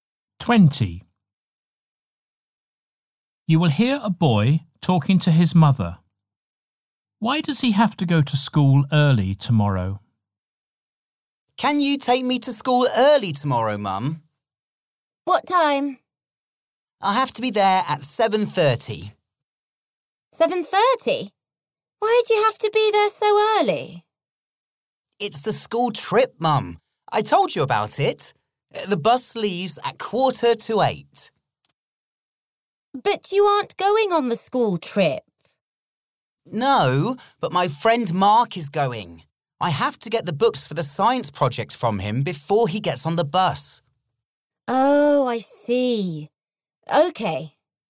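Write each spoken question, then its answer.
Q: Why does he have to go to school early tomorrow?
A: To get the science project books from his friend Mark before the school trip bus leaves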